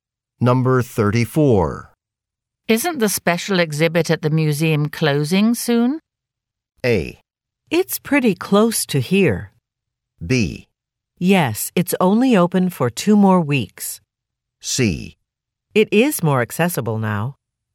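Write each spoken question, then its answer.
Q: Isn't the special exhibit at the museum closing soon?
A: B: Yes, it's only open for 2 more weeks.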